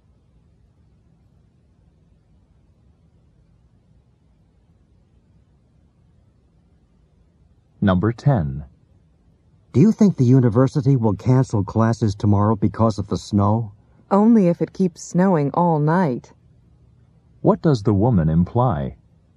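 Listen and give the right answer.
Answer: Classes probably won't be canceled unless it snows all night.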